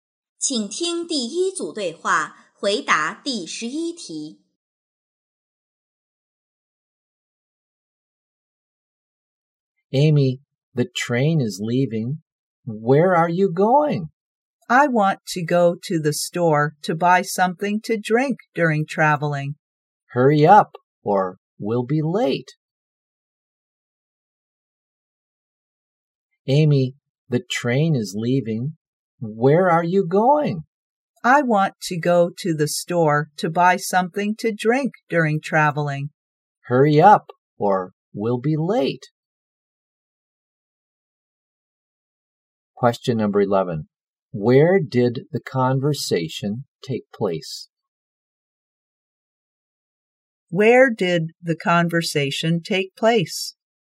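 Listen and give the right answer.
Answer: At the train station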